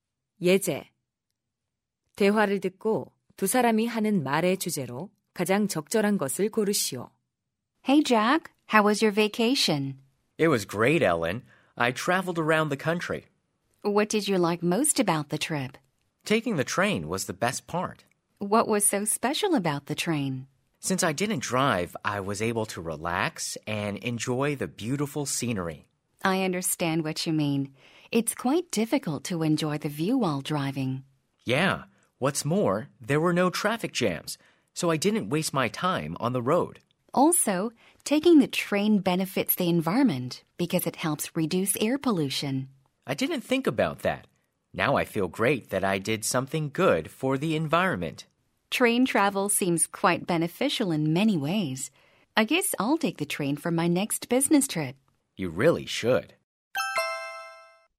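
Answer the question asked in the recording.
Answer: 기차 여행의 장점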